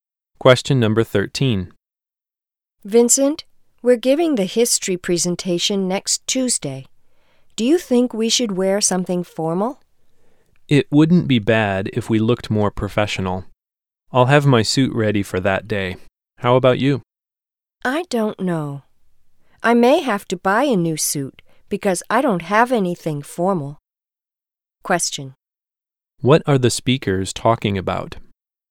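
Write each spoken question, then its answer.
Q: What are the speakers talking about?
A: What to wear for their presentation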